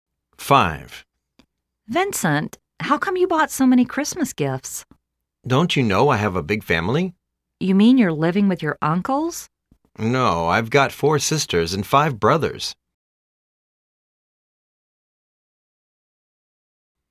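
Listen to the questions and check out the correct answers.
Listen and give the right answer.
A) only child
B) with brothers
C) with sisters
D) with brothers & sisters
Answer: D) with brothers & sisters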